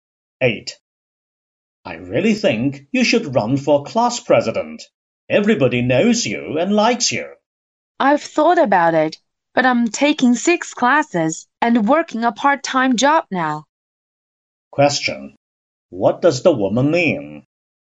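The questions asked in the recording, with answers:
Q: What does the woman mean?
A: She is too busy to run for class president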